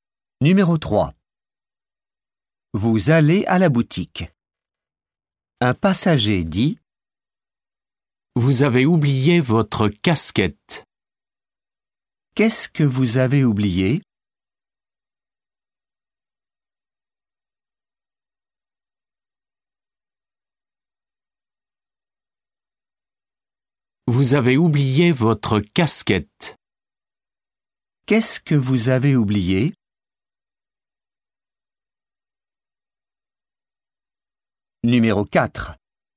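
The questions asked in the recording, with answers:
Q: Qu'est-ce que vous avez oublié ?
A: votre casquette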